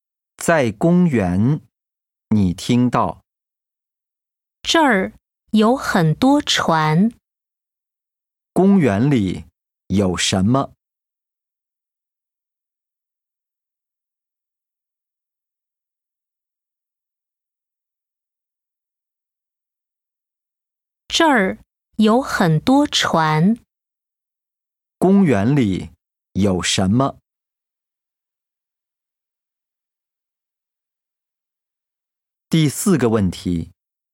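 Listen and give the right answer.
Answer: 很多船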